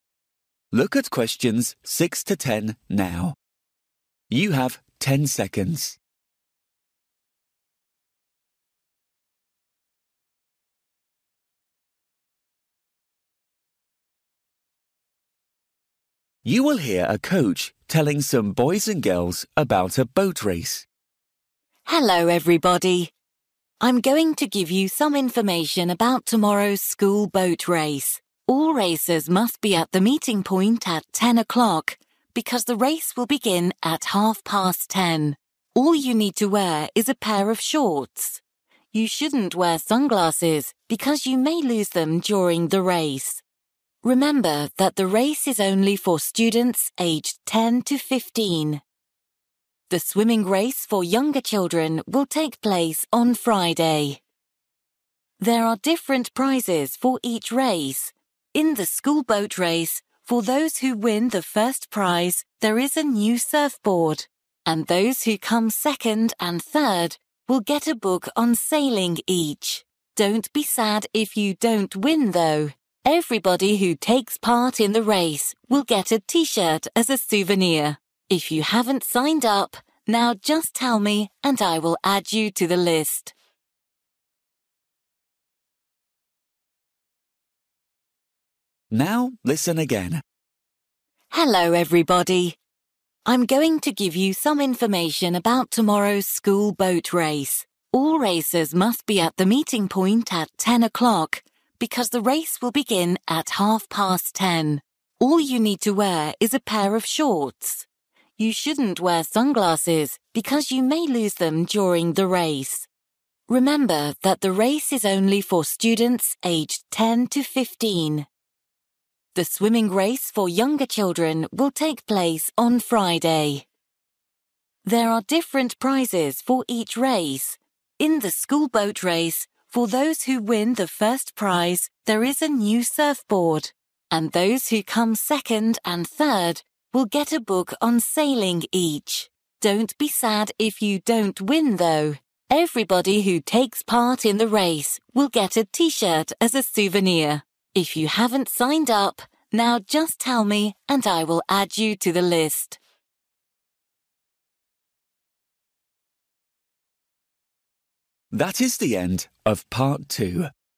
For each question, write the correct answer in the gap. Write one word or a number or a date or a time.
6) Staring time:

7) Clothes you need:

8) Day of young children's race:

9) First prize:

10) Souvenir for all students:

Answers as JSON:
{"6": "10.30", "7": "shorts", "8": "Friday", "9": "surfboard", "10": "T-shirt"}

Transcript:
Hello everybody. I'm going to give you some information about tomorrow's school boat race. All racers must be at the meeting point at ten o'clock because the race will begin at half past ten. All you need to wear is a pair of shorts. You shouldn't wear sunglasses because you may lose them during the race.
Remember that the race is only for students aged 10 to 15. The swimming race for younger children will take place on Friday.
There are different prizes for each race. In the school boat race, for those who win the first prize there is a new surfboard, and those who come second and third will get a book on sailing each. Don't be sad if you don't win, though: everybody who takes part in the race will get a T-shirt as a souvenir. If you haven't signed up, now just tell me and I will add you to the list.

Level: KET (A2)